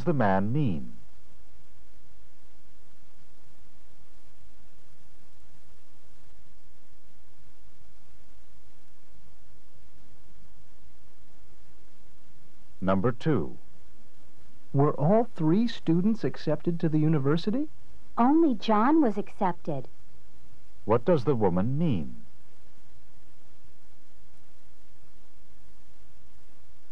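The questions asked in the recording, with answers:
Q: What does the woman mean?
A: Only John was accepted; the other two were not.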